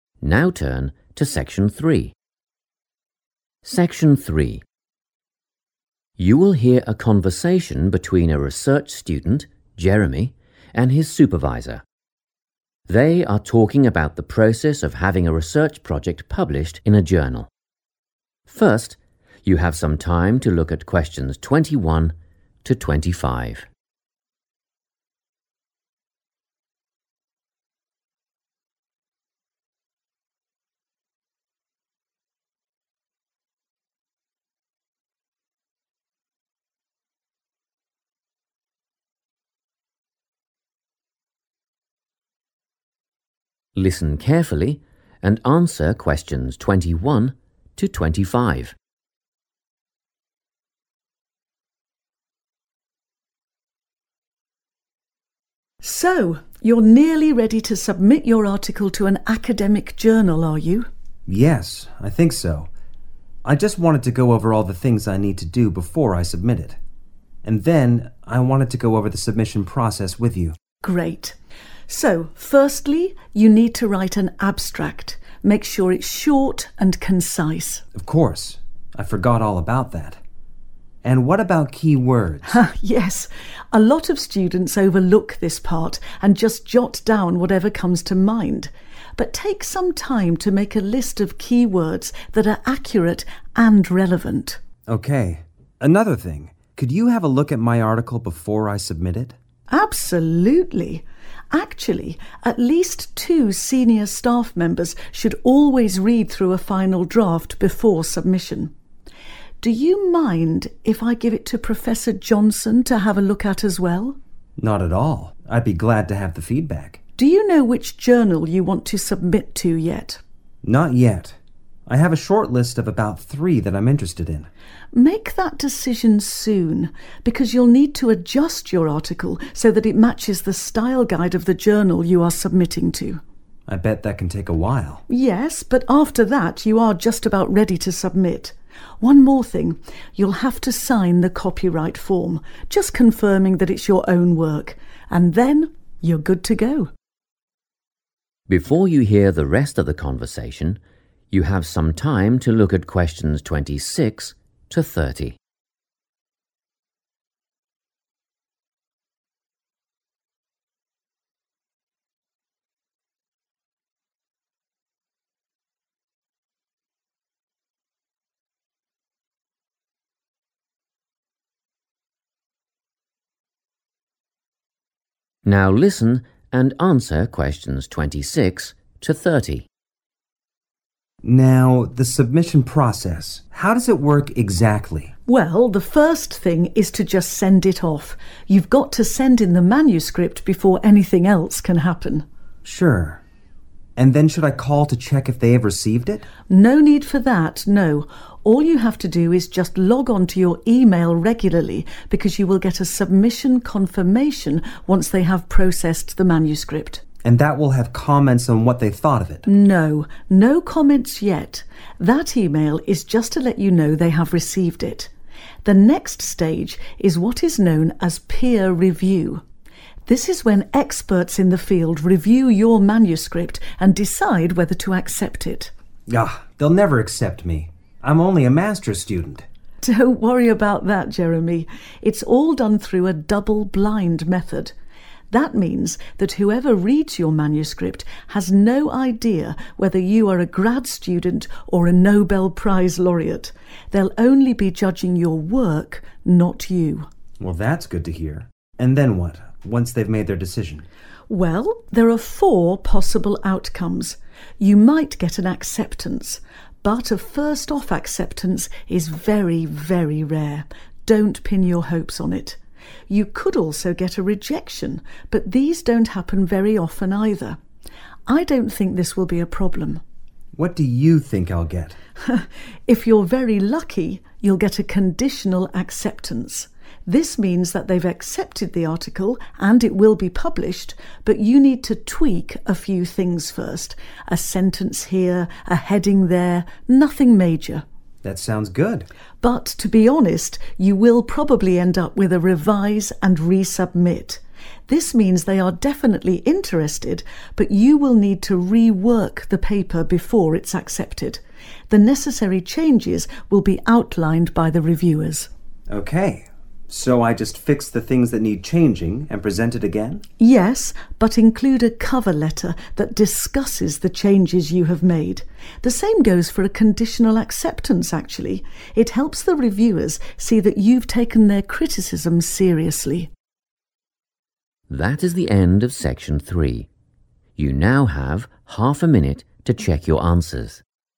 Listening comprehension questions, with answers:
Complete the notes below. Write NO MORE THAN TWO WORDS for each answer.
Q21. Write an _____ – keep it brief.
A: abstract

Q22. List relevant _____ .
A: key words / keywords

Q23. Have two academic advisors read over your _____ .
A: final draft

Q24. Apply the journal's _____ to your article.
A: style guide

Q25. Sign the _____ .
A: copyright form

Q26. Submit _____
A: the manuscript / manuscript

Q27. Check e-mail for _____ of submission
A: confirmation

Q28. _____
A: peer review

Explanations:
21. The correct answer is "abstract" because the Supervisor explicitly tells Jeremy that the very first thing he needs to do is write one. The Supervisor also mentions that this summary should be "short and concise," which matches the description "keep it brief" found in the checklist notes.
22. The correct answer is keywords because the supervisor suggests making a list of these starting with the word 'relevant'. In the transcript, the supervisor advises Jeremy to take time to create a list of 'key words' that are both 'accurate and relevant' to his project.
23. The correct answer is "final draft" because the supervisor mentions that two senior staff members (which matches the meaning of academic advisors) should read this specific version of the article before it is submitted. The transcript links the act of reading by senior staff directly to the "final draft" stage of the project.
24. The correct answer is 'style guide' because the supervisor tells Jeremy he needs to pick a journal quickly. This is so he can change his article to follow the 'style guide' (the specific set of rules) used by that specific journal. The phrase 'adjust your article so that it matches' is another way of saying 'apply'.
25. The correct answer is 'copyright form' because, according to the supervisor, this is the final requirement for Jeremy to complete before submitting his article. The supervisor uses the verb 'sign', which matches the prompt perfectly, and explains that this document is used for 'confirming' that he did the work himself.
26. The correct answer is identified by looking for the first step Jeremy needs to take in the submission process. The supervisor explains that the very first action is to 'send it off' and clarifies that he must 'send in the manuscript' before the rest of the process can begin. In the flow-chart, 'Submit' serves as a synonym for 'send in'.
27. The correct answer is 'confirmation' because the supervisor tells Jeremy he should check his email frequently after sending his article. He explains that Jeremy will receive a 'submission confirmation' once the journal has received and started processing his paper. This matches the step in the chart where one must check email for a specific notice regarding the submission.
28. The correct answer is "peer review" because it is the next step in the process after the student receives a confirmation email. The supervisor explains that this is when experts look at the work to decide if the journal should accept it. In the flow-chart, this fits right after checking for the submission confirmation.

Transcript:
Section 3
You will hear a conversation between a research student, Jeremy, and his supervisor. They are talking about the process of having a research project published in a journal. First, you have some time to look at questions 21 to 25.
Listen carefully and answer questions 21 to 25.
SUPERVISOR: So, you're nearly ready to submit your article to an academic journal, are you?
JEREMY: Yes, I think so. I just wanted to go over all the things I need to do before I submit it. And then I wanted to go over the submission process with you.
SUPERVISOR: Great. So, firstly, you need to write an abstract. Make sure it's short and concise.
JEREMY: Of course, I forgot all about that. And what about key words?
SUPERVISOR: Yes, a lot of students overlook this part and just jot down whatever comes to mind. But take some time to make a list of key words that are accurate and relevant.
JEREMY: Okay. Another thing, could you have a look at my article before I submit it?
SUPERVISOR: Absolutely. Actually, at least two senior staff members should always read through a final draft, before submission. Do you mind if I give it to Professor Johnson to have a look at, as well?
JEREMY: Not at all. I'd be glad to have the feedback.
SUPERVISOR: Do you know which journal you want to submit to yet?
JEREMY: Not yet. I have a shortlist of about three that I'm interested in.
SUPERVISOR: Make that decision soon. Because you'll need to adjust your article so that it matches the style guide of the journal you are submitting to.
JEREMY: I bet that can take a while.
SUPERVISOR: Yes, but after that you are just about ready to submit. One more thing, you'll have to sign the copyright form - just confirming that it's your own work - and then you're good to go.
Before you hear the rest of the conversation, you have some time to look at questions 26 to 30.
Now listen and answer questions 26 to 30.
JEREMY: Now, the submission process. How does it work exactly?
SUPERVISOR: Well, the first thing is to just send it off. You've got to send in the manuscript before anything else can happen.
JEREMY: Sure. And then should I call to check if they have received it?
SUPERVISOR: No need for that, no, all you have to do is just log onto your e-mail regularly because you will get a submission confirmation once they have processed the manuscript.
JEREMY: And that will have comments on what they thought of it?
SUPERVISOR: No, no comments yet - that e-mail is just to let you know they have received it. The next stage is what is known as peer review. This is when experts in the field review your manuscript and decide whether to accept it.
JEREMY: Aagh, they'll never accept me. I'm only a Master's student!
SUPERVISOR: Don't worry about that, Jeremy. It's all done through a double-blind method. That means that whoever reads your manuscript has no idea whether you are a grad student or a Nobel Prize laureate. They'll only be judging your work, not you.
JEREMY: Well that's good to hear. And then what, once they've made their decision?
SUPERVISOR: Well, there are four possible outcomes. You might get an acceptance. But a first-off acceptance is very, very rare. Don't pin your hopes on it. You could also get a rejection, but these don't happen very often either. I don't think this will be a problem.
JEREMY: What do you think I'll get?
SUPERVISOR: If you're very lucky, you'll get a conditional acceptance. This means that they've accepted the article and it will be published, but you need to tweak a few things first: a sentence here, a heading there, nothing major.
JEREMY: That sounds good.
SUPERVISOR: But, to be honest, you will probably end up with a revise & resubmit. This means they are definitely interested, but you will need to rework the paper before it's accepted. The necessary changes will be outlined by the reviewers.
JEREMY: Okay, so I just fix the things that need changing and present it again?
SUPERVISOR: Yes, but include a cover letter that discusses the changes you have made. The same goes for a conditional acceptance, actually. It helps the reviewers see that you've taken their criticism seriously.
That is the end of section 3. You now have half a minute to check your answers.